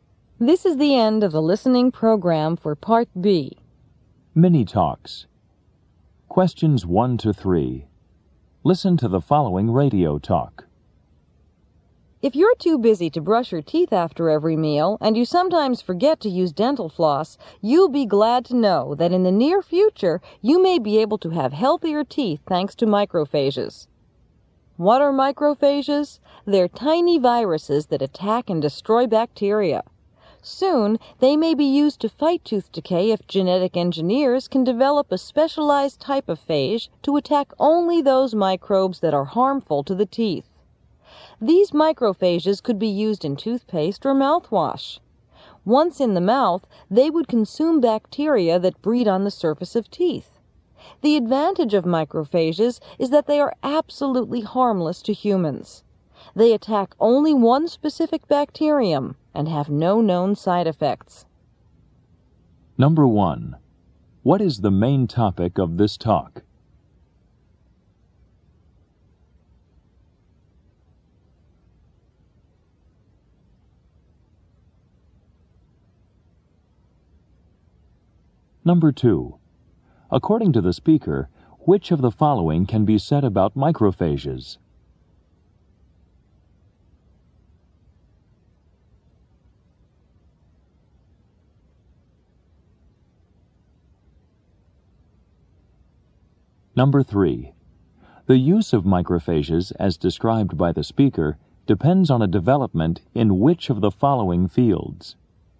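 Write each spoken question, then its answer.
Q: What is the main topic of this talk?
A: Using microphages to fight tooth decay.

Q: According to the speaker, which of the following can be said about microphages?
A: They are harmless to humans and attack only one specific bacterium.

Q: The use of microphages, as described by the speaker, depends on a development in which of the following fields?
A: Genetic engineering.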